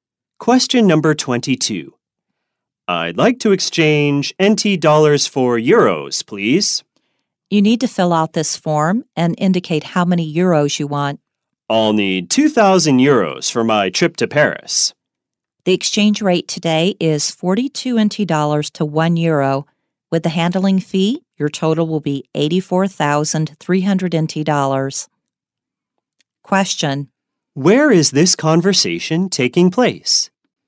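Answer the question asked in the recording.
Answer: At a bank (currency exchange)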